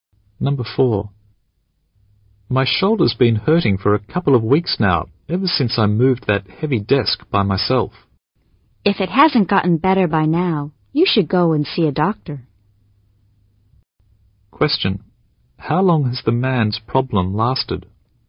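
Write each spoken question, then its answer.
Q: How long has the man's problem lasted?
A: A couple of weeks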